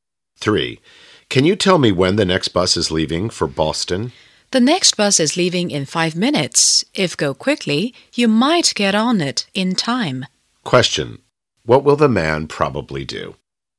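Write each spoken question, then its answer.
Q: What will the man probably do?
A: Hurry to catch the next bus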